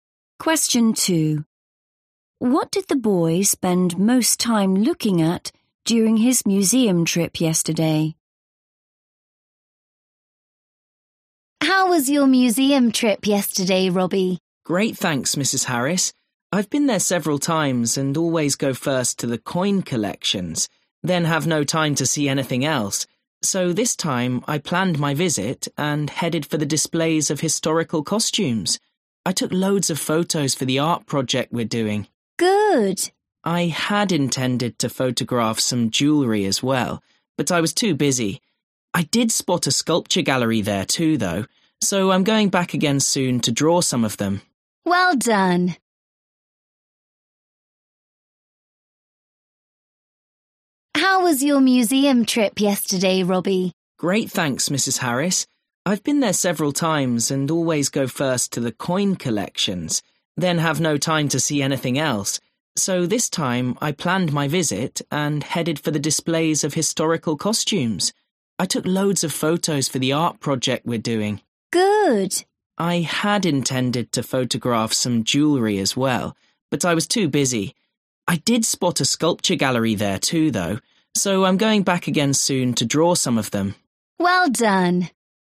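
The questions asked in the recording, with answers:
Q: What did the boy spend most time looking at during his museum trip yesterday?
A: historical costumes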